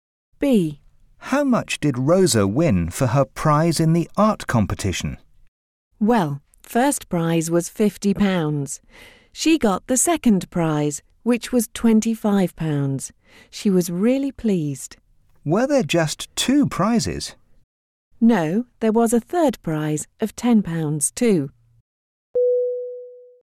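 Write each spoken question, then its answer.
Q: How much did Rosa win for her prize in the art competition?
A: £25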